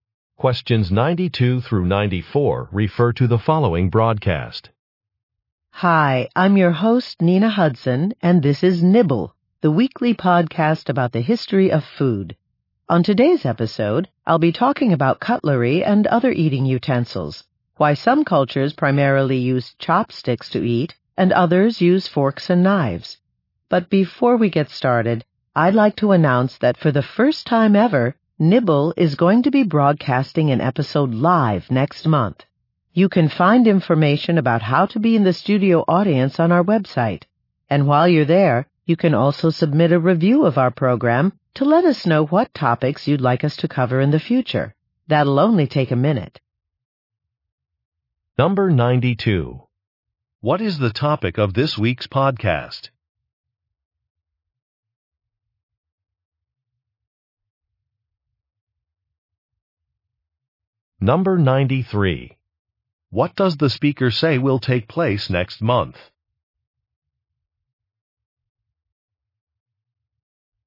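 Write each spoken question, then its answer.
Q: What is the topic of this week's podcast?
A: Eating utensils

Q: What does the speaker say will take place next month?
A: A live broadcast of an episode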